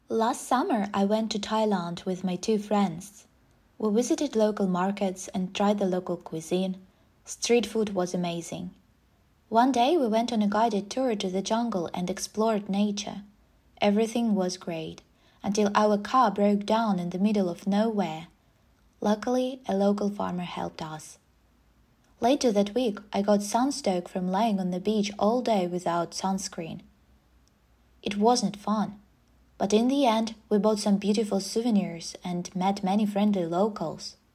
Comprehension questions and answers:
Listen to a short travel story and decide if the statements are True or False.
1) They visited local markets and ate local food.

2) They had no problems during the trip.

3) Their car broke down during a jungle tour.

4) They got sunstroke because they didn't wear a hat.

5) They met unfriendly locals.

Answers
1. True
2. False
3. True
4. False
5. False

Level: 8 класс